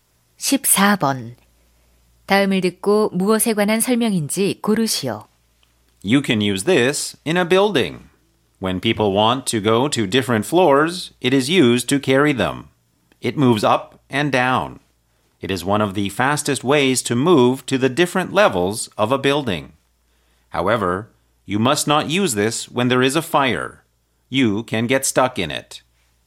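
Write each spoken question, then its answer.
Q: 다음을 듣고 무엇에 관한 설명인지 고르시오.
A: 엘리베이터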